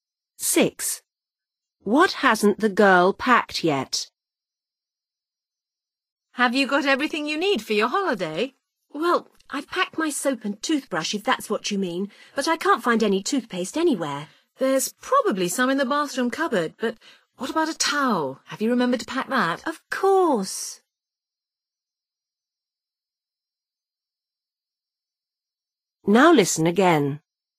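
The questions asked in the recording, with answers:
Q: What hasn't the girl packed yet?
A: toothpaste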